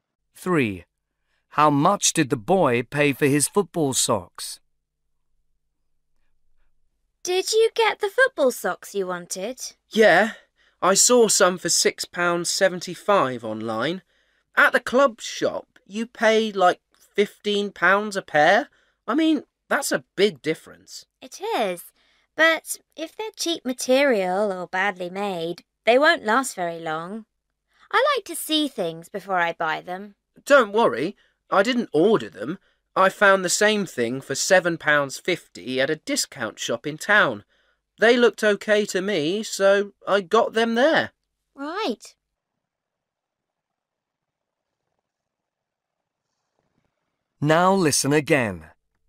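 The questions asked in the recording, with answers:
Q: How much did the boy pay for his football socks?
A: £7.50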